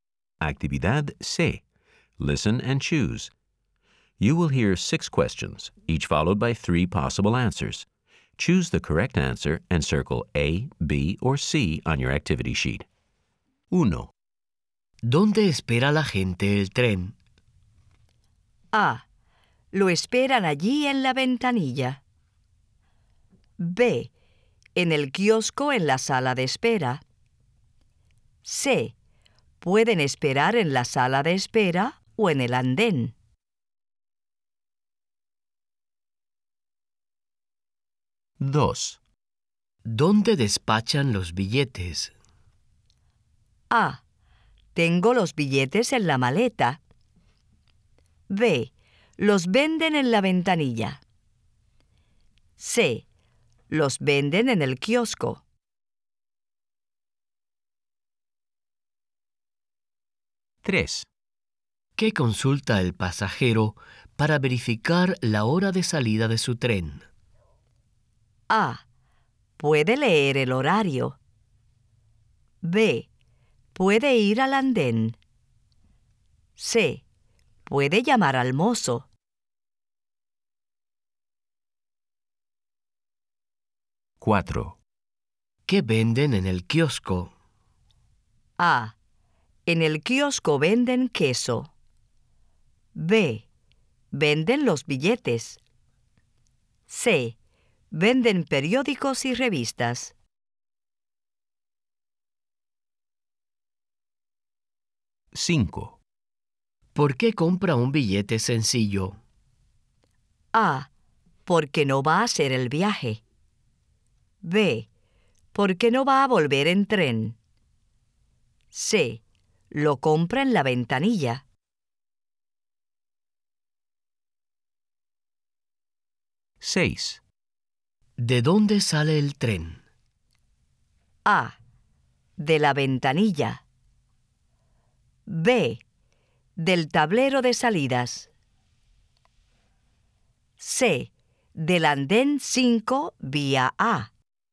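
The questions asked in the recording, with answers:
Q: ¿Dónde espera la gente el tren?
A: C: Pueden esperar en la sala de espera o en el andén.

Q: ¿Dónde despachan los billetes?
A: B: Los venden en la ventanilla.

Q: ¿Qué consulta el pasajero para verificar la hora de salida de su tren?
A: A: Puede leer el horario.

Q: ¿Qué venden en el kiosco?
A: C: Venden periódicos y revistas.

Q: ¿Por qué compra un billete sencillo?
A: B: Porque no va a volver en tren.

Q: ¿De dónde sale el tren?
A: C: Del andén 5 vía A.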